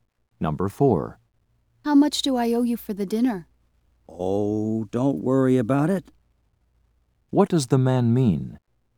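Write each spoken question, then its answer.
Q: What does the man mean?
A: He will pay for the dinner; she owes nothing.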